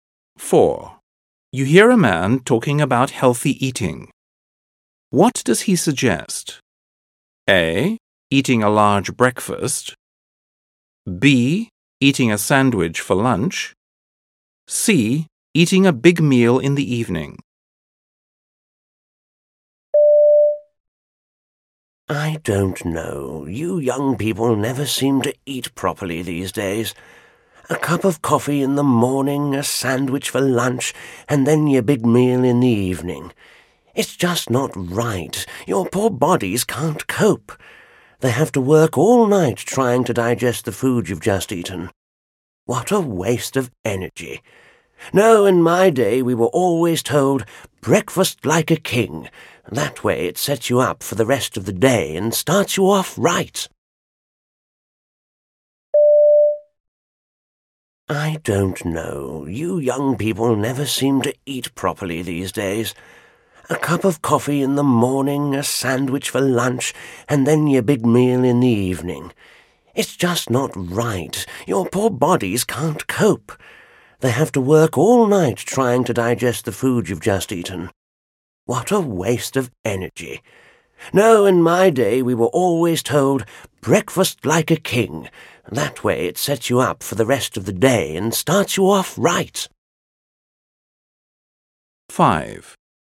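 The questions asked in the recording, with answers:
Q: What does he suggest?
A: A: Eating a large breakfast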